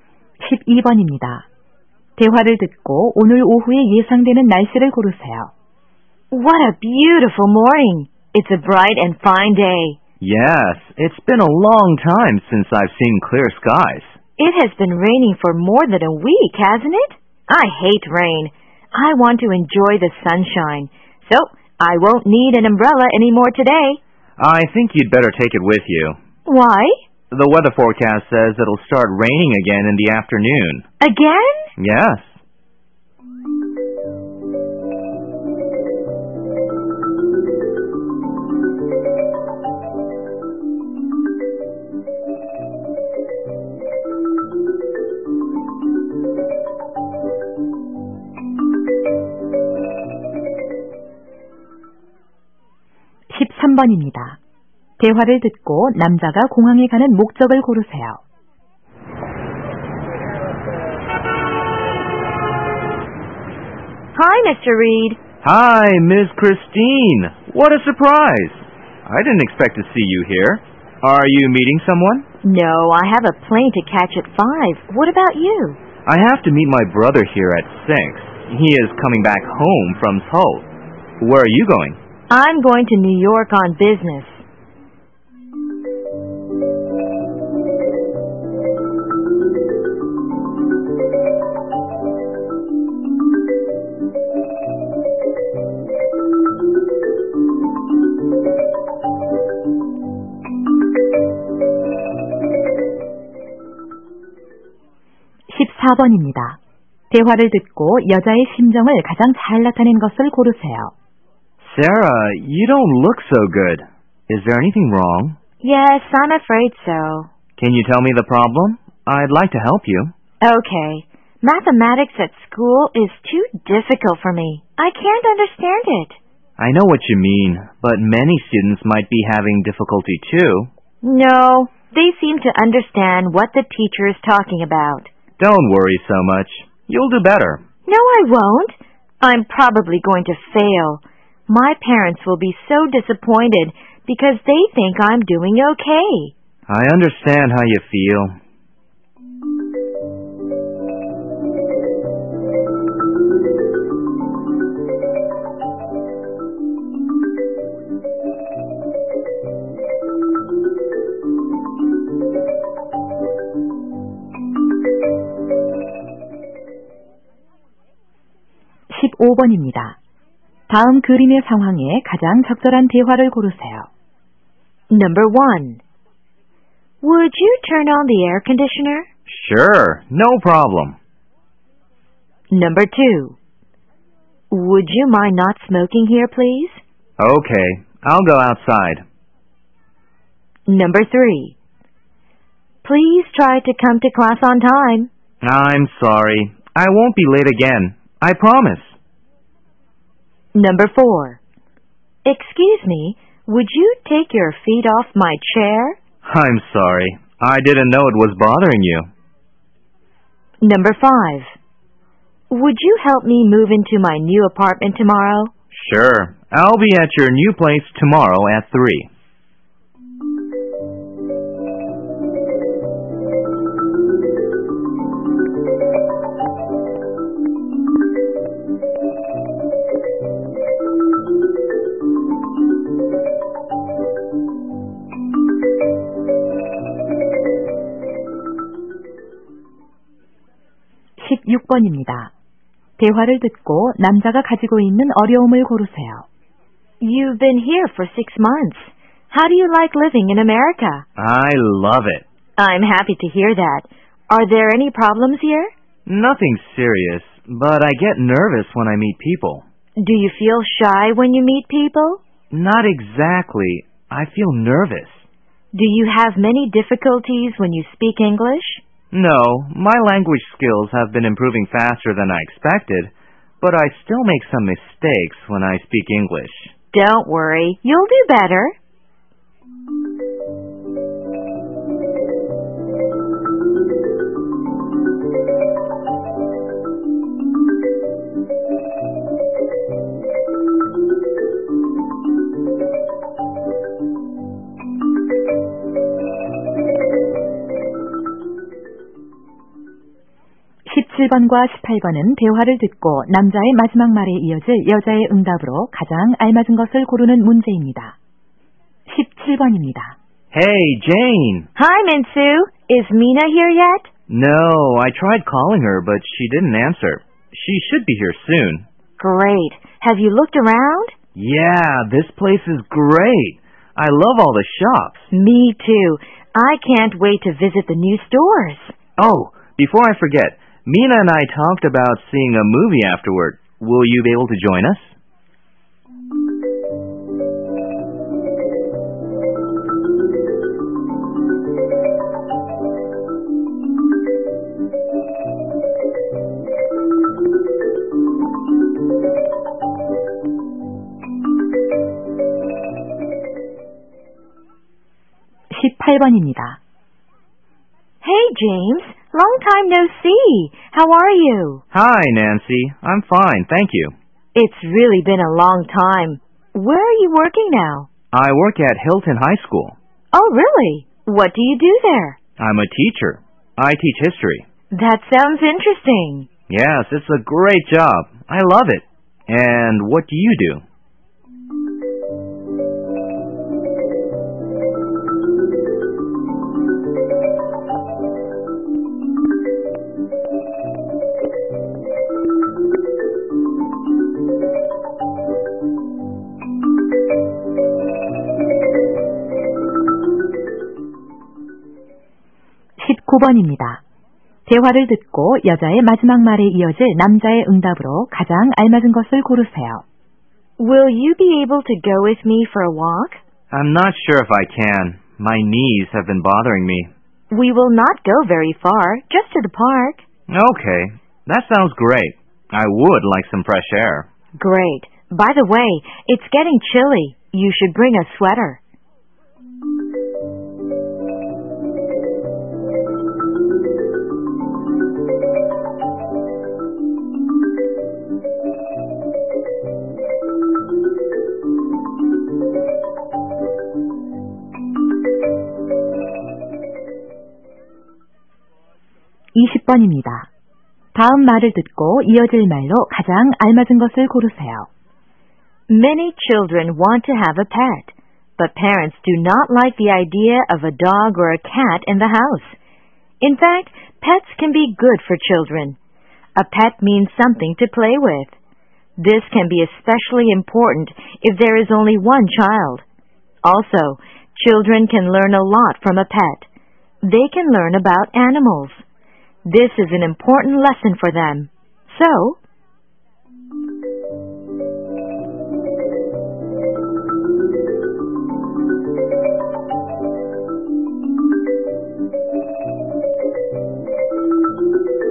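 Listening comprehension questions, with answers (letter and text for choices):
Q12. 대화를 듣고, 오늘 오후에 예상되는 날씨를 고르시오.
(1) sunny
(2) stormy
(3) windy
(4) cloudy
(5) rainy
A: (5) rainy

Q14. 대화를 듣고 여자의 심정을 가장 잘 나타낸 것을 고르시오.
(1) angry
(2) worried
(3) ashamed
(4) satisfied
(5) astonished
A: (2) worried

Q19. 대화를 듣고, 여자의 마지막 말에 이어질 남자의 응답으로 가장 알맞은 것을 고르시오.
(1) Oh! That's a good idea.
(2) O.K. See you next time.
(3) I can. I don't like waiting.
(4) That's interesting. I like parks.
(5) Of course. I have to visit a doctor.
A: (1) Oh! That's a good idea.

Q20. So, ______________________________.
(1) dogs are nicer than cats.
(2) you should take care of pets.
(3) pets can be good for children.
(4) cats do not make a lot of noise.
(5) parents sometimes do not like pets.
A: (3) pets can be good for children.

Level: 2003학년도 1회 2학년 듣기평가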